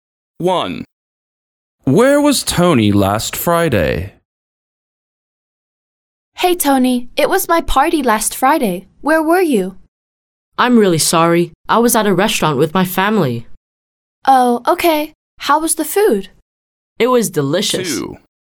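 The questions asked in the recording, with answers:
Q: Where was Tony last Friday?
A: At a restaurant with his family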